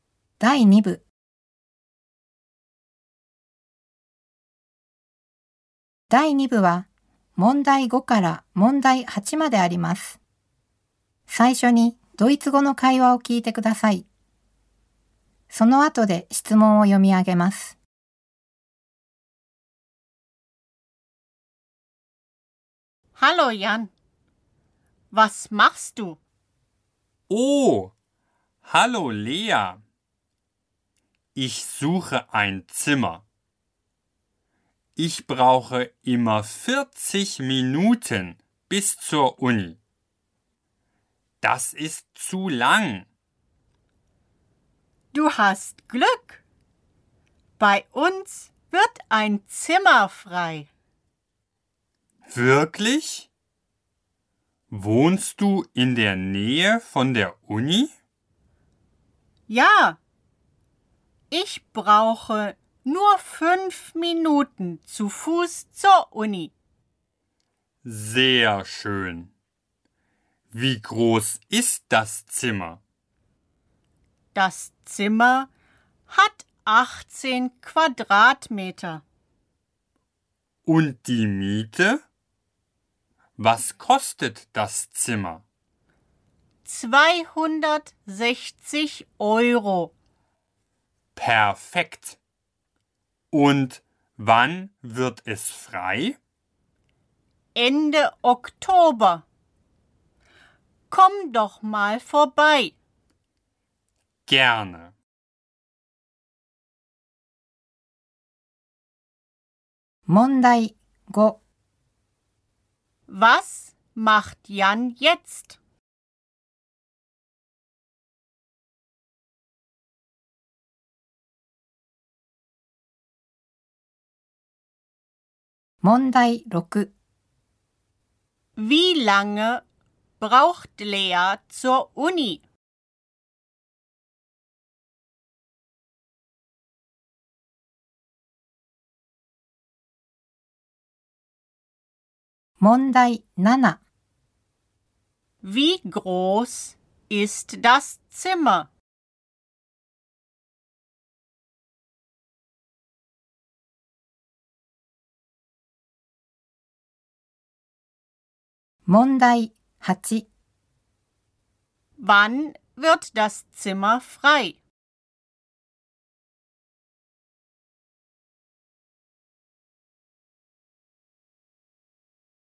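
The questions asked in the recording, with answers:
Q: Was macht Jan jetzt?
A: Er sucht ein Zimmer.

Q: Wie lange braucht Lea zur Uni?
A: 5 Minuten zu Fuß

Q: Wie groß ist das Zimmer?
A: 18 Quadratmeter

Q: Wann wird das Zimmer frei?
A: Ende Oktober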